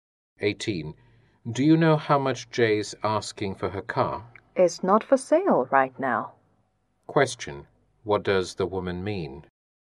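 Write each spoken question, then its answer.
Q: What does the woman mean?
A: Jay doesn't want to sell her car now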